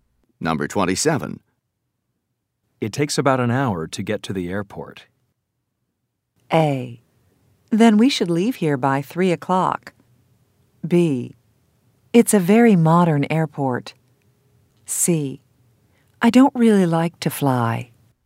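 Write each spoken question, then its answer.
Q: It takes about an hour to get to the airport.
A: A: Then we should leave here by 3 o'clock.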